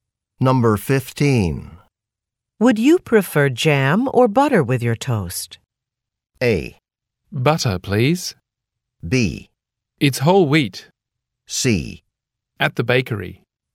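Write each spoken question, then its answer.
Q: Would you prefer jam or butter with your toast?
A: A: Butter, please.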